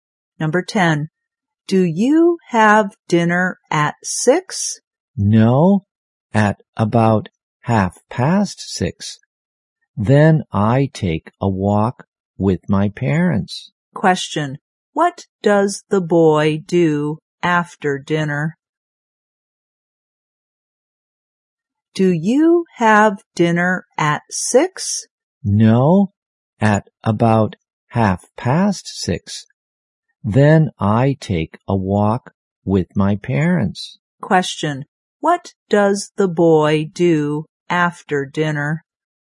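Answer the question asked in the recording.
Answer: He takes a walk with his parents.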